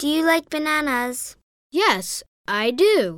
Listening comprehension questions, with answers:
Does he like bananas?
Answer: Yes, he likes bananas.